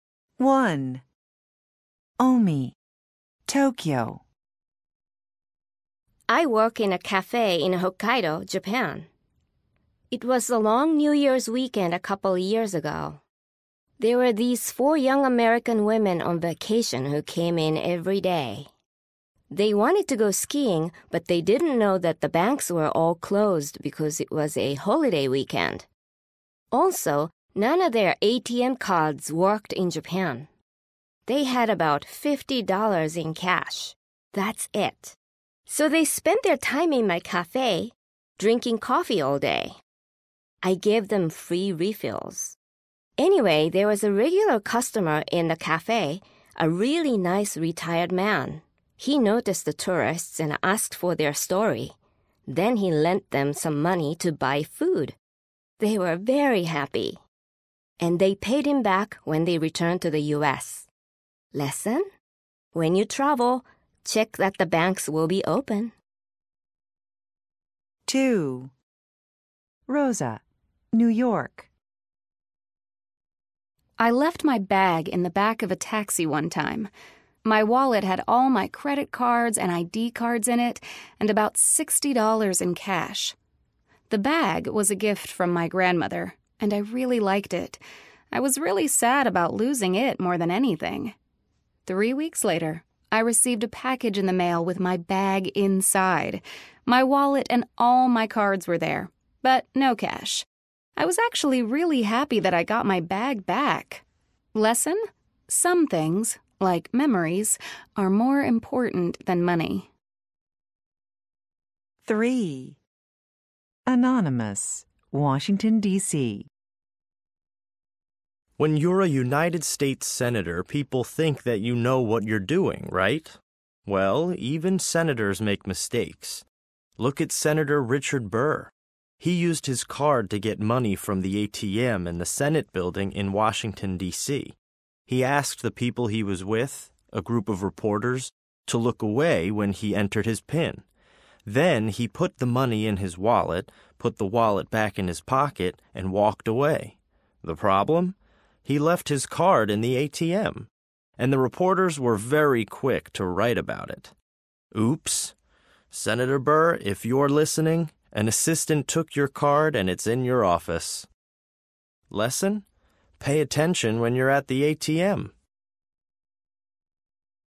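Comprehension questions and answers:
LISTEN FOR DETAIL Listen to the podcast again. Check (✔) the sentences that are true. Correct the false ones.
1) The women spent many hours drinking tea.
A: false

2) The women borrowed some money from a man in the café.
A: true

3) Rosa had $60 in her bag when she was in the taxi.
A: true

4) The money was still in her bag when she got it back.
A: false

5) Senator Richard Burr didn't want people to see him enter his PIN.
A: true

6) The Senator left his cash in the ATM.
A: false

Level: A2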